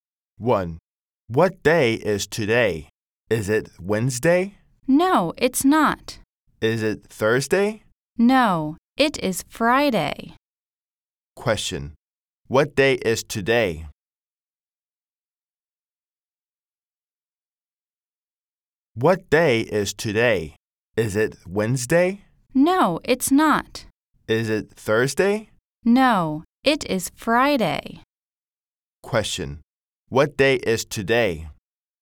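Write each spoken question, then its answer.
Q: Question, what day is today?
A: Friday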